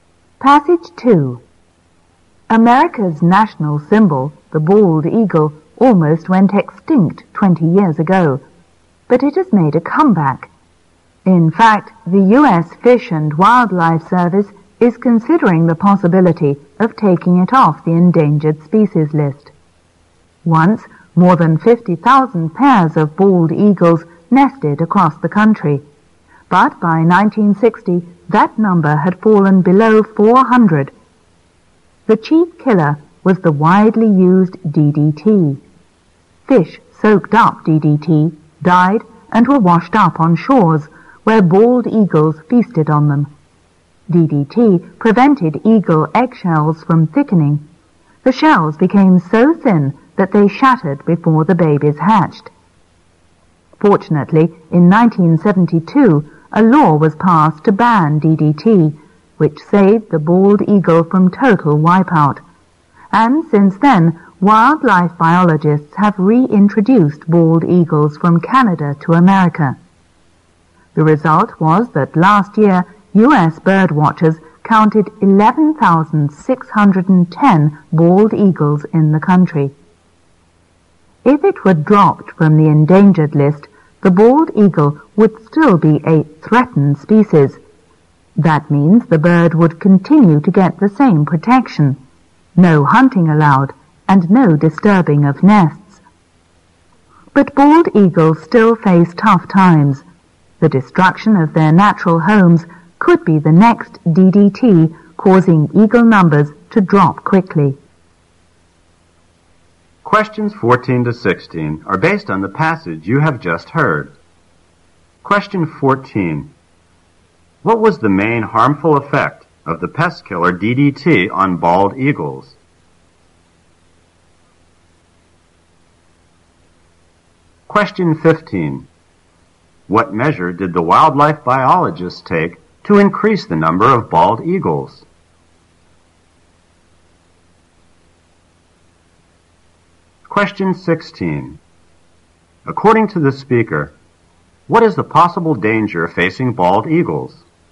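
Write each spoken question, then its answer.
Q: What was the main harmful effect of the pest killer DDT on bald eagles?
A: It made eagle eggshells too thin, so they broke before hatching.

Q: What measure did the wildlife biologists take to increase the number of bald eagles?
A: They brought bald eagles from Canada to America.

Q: According to the speaker, what is the possible danger facing bald eagles?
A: The destruction of their natural homes.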